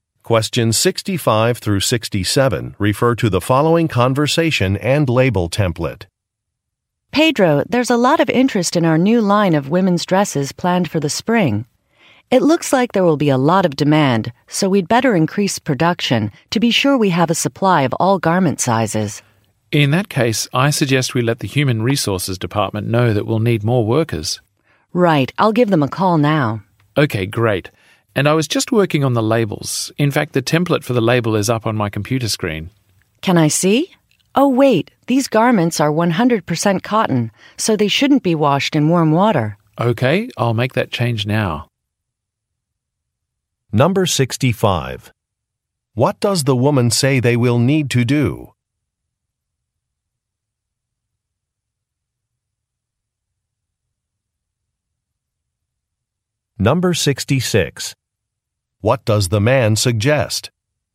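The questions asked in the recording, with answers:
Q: What does the woman say they will need to do?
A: Increase production

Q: What does the man suggest?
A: Telling the Human Resources Department that they will need more workers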